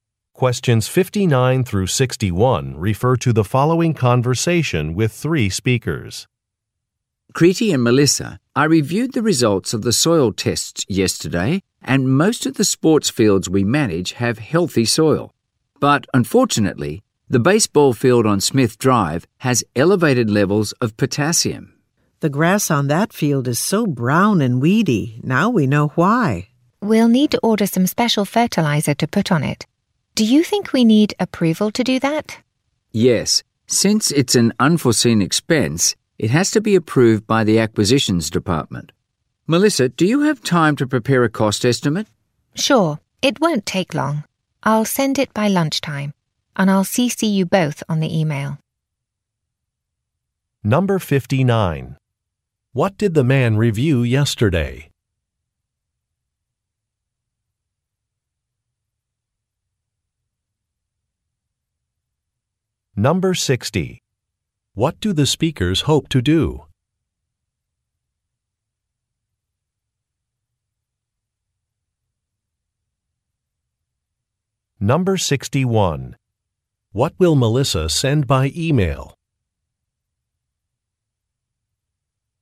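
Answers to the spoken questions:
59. Soil test results
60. Put special fertilizer on the baseball field
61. A cost estimate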